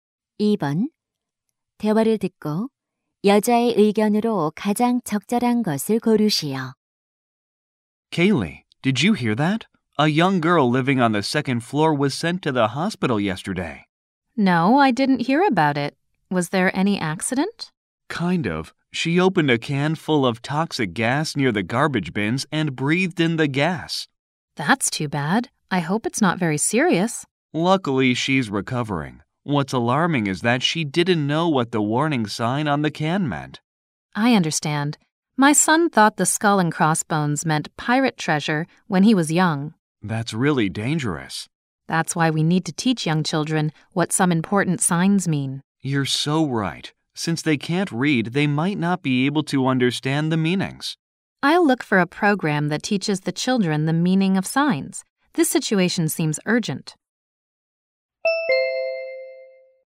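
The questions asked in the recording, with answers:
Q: 대화를 듣고 여자의 의견으로 가장 적절한 것을 고르시오.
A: 어린아이들에게 중요한 표지의 의미를 가르쳐야 한다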